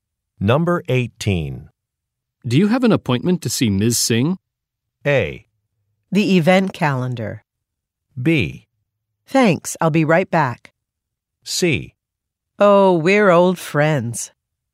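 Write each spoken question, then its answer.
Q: Do you have an appointment to see Ms.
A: C: Oh, we're old friends.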